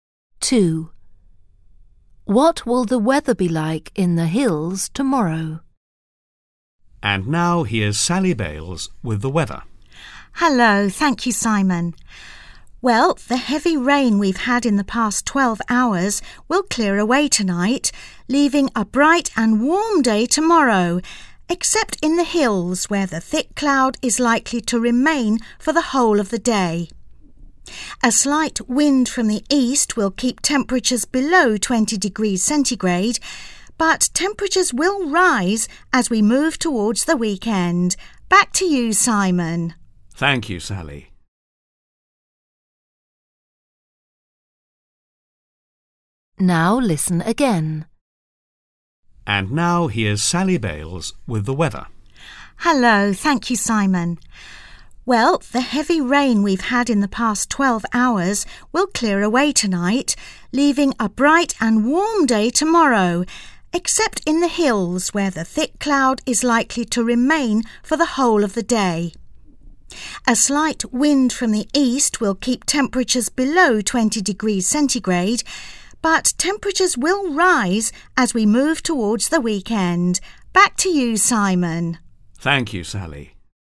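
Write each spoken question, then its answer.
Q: What will the weather be like in the hills tomorrow?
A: Cloudy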